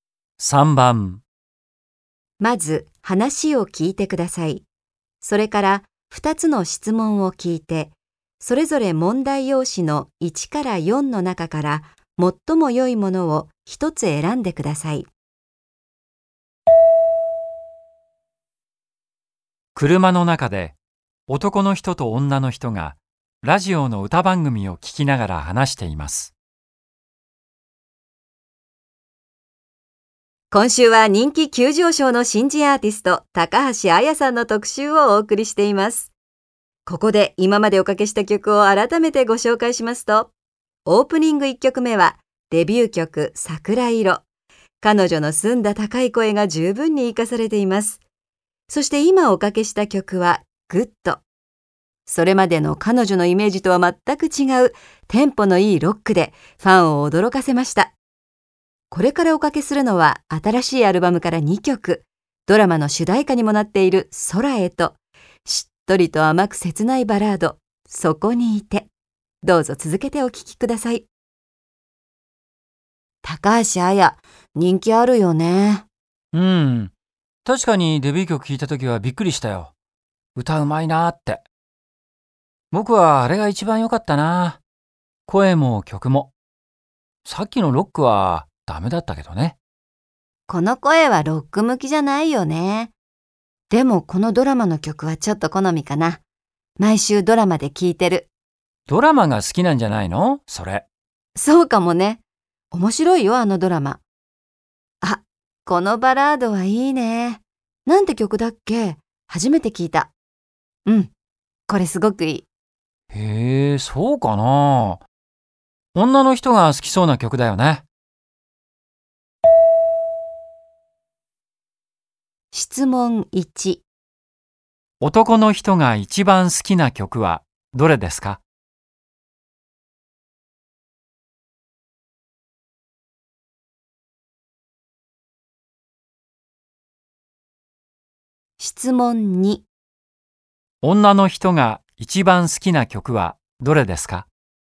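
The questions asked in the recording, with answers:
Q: 男の人が一番好きな曲はどれですか?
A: 桜色

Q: 女の人が一番好きな曲はどれですか?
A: そこにいて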